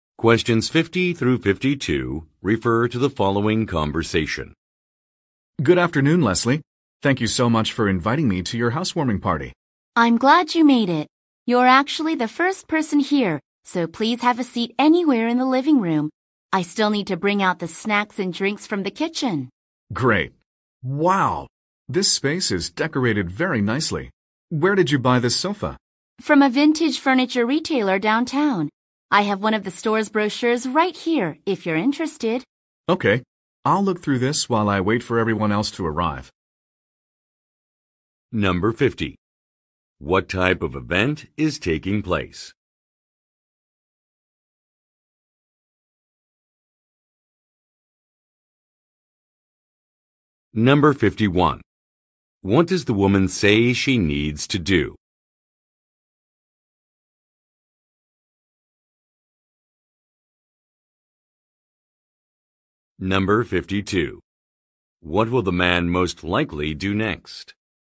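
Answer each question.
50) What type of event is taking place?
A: A social gathering

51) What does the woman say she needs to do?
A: Put out some refreshments

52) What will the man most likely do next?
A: Read a pamphlet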